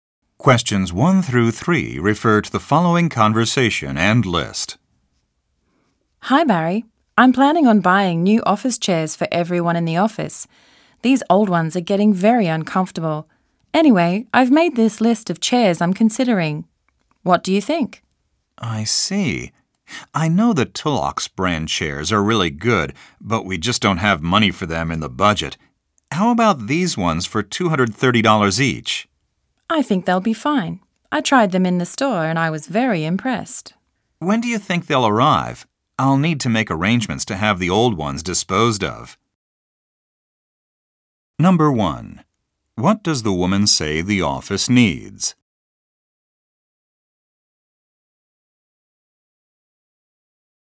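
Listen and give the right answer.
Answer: New office chairs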